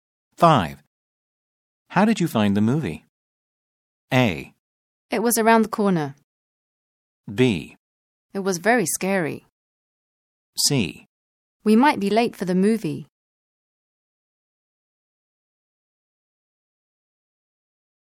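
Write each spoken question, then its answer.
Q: How did you find the movie?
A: B: It was very scary.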